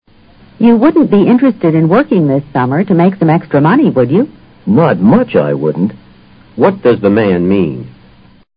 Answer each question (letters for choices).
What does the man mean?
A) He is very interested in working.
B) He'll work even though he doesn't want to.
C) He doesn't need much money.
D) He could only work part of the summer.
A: A

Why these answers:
not much I wouldn't 是双重否定,等于是说I would be interested very much。make some extra money:挣些外块。